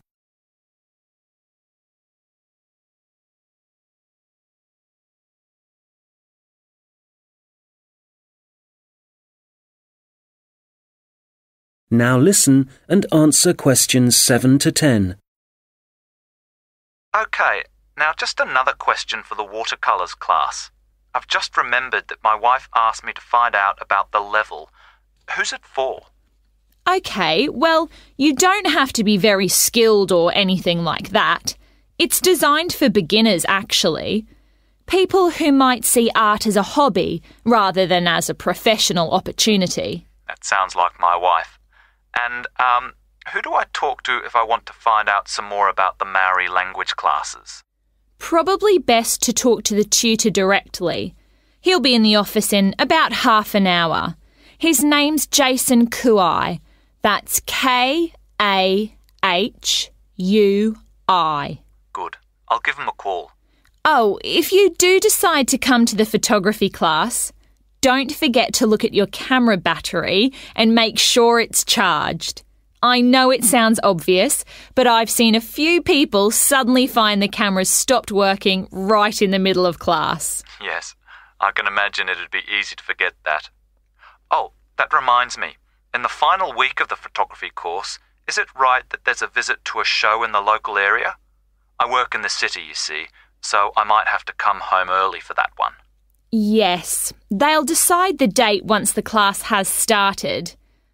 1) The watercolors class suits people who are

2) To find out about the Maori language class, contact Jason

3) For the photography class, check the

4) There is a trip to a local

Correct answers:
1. beginners
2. Kahui
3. battery
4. show

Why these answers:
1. OK, well you don't have to be very skilled or anything like that. It's designed for (=suits) beginners, actually (OK, bạn không cần phải có kỹ năng cao hay bất cứ điều gì tương tự. Nó thực tế được thiết kế cho người mới bắt đầu). People who might see art as a hobby rather than as a professional opportunity.
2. Probably best to talk to (=contact) the tutor directly. He'll be in the office in about half an hour. His name's Jason Kahui. That's K-A-H-U-I (Có lẽ tốt nhất là nói chuyện trực tiếp với gia sư. Anh ấy sẽ ở văn phòng trong khoảng nửa giờ nữa. Tên anh ấy là Jason Kahui. Đó là K-A-H-U-I).
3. Oh, if you do decide to come to the photography class, don't forget to look at your camera battery and make sure it's charged (Ồ, nếu bạn quyết định tham gia lớp chụp ảnh, đừng quên kiểm tra pin máy ảnh của bạn và đảm bảo rằng nó đã được sạc đầy). I know it sounds obvious but I've seen a few people suddenly find the camera's stopped working right in the middle of class.
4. Oh, that reminds me, in the final week of the photography course, is it right that there's a visit (=a trip) to a show in the local area? (Ồ, điều đó nhắc tôi nhớ, trong tuần cuối cùng của khóa học nhiếp ảnh, có đúng là có một chuyến đi đến buổi biểu diễn ở khu vực địa phương không?)